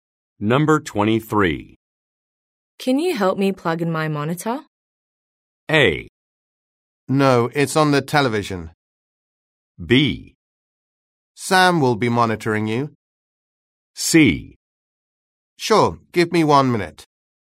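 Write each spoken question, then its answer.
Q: Can you help me plug in my monitor?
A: C: Sure, give me 1 minute.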